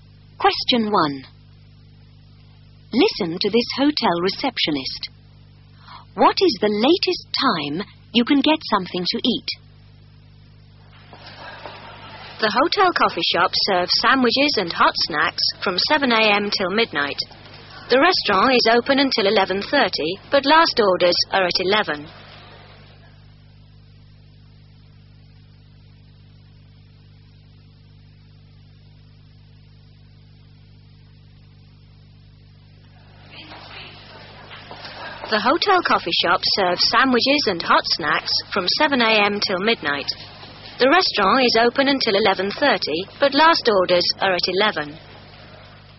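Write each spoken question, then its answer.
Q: What is the latest time you can get something to eat?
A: Midnight (at the coffee shop)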